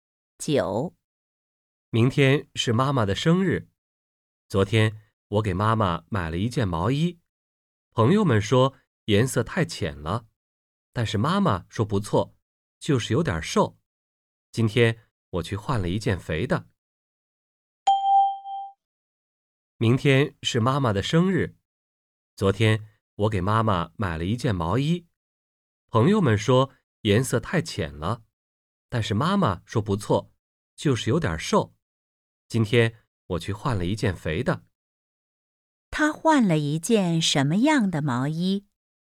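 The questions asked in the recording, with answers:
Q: 他换了一件什么样的毛衣?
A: 一件肥一点的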